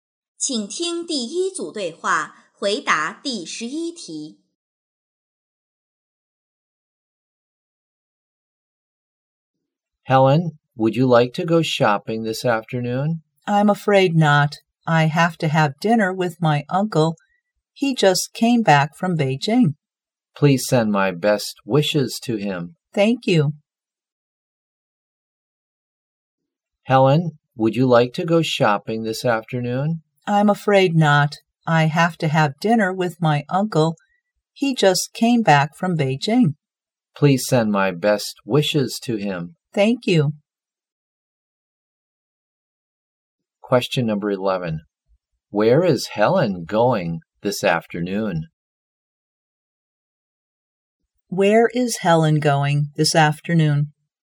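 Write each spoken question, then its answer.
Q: Where is Helen going this afternoon?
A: To have dinner with her uncle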